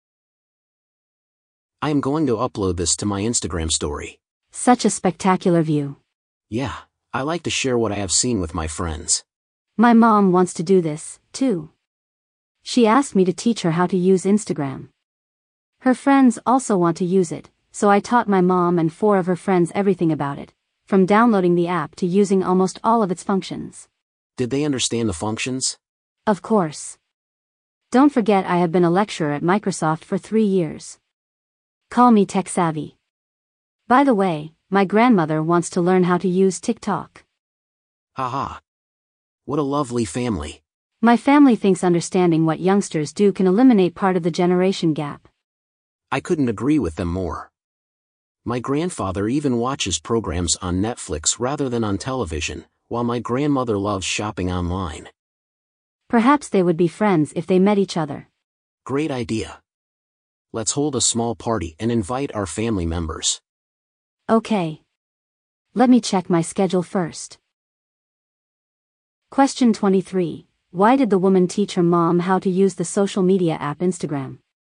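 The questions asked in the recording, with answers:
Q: Why did the woman teach her mom how to use the social media app Instagram?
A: Because her mom asked her to teach her how to use it.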